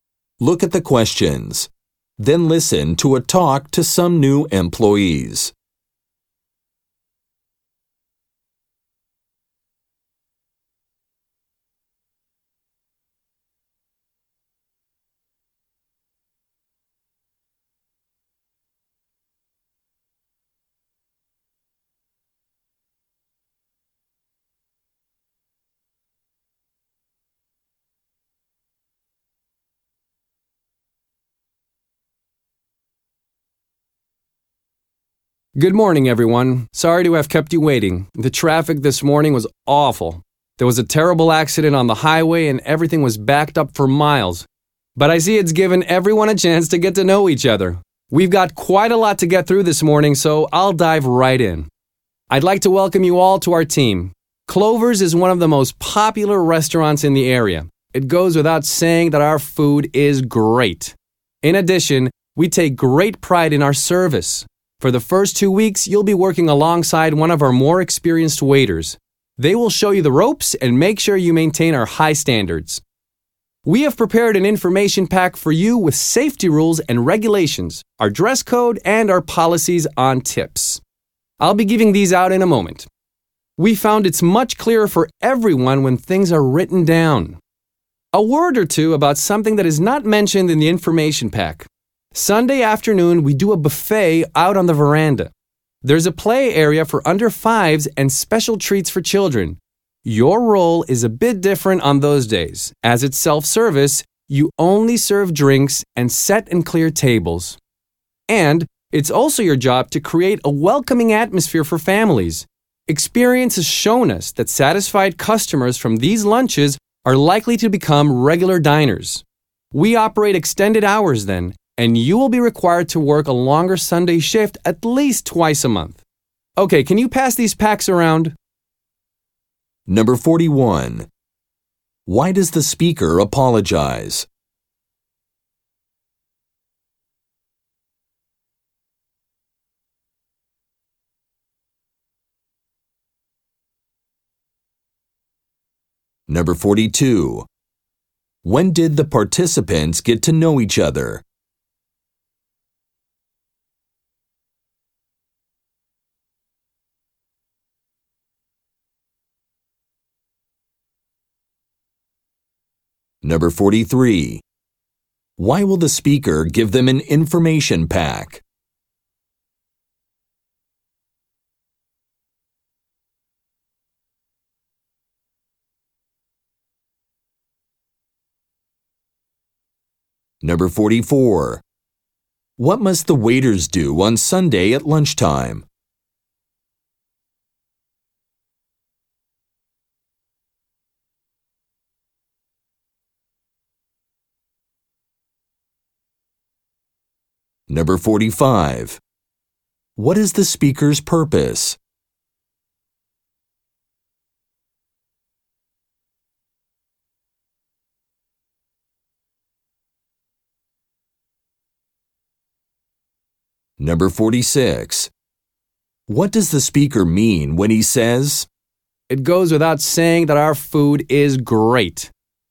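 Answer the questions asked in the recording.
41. He was late because of traffic
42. While waiting for the speaker
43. Things are clearer when written down
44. Serve drinks, set and clear tables
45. To welcome and orient new employees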